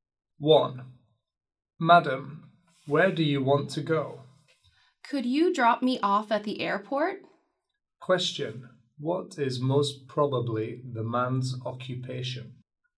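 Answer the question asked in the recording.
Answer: A taxi driver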